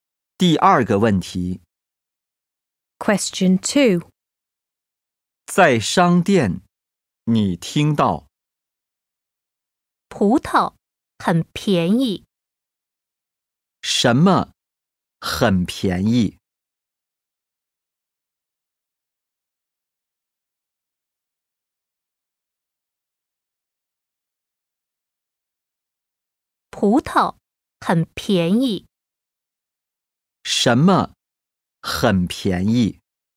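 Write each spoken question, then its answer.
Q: 什么很便宜?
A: 葡萄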